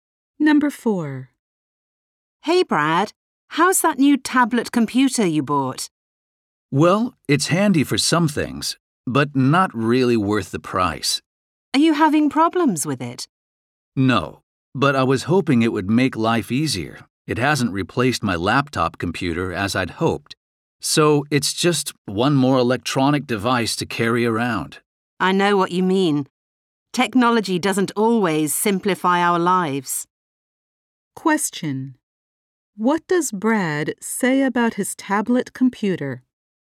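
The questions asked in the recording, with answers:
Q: What does Brad say about his tablet computer?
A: It isn't worth the price; it hasn't replaced his laptop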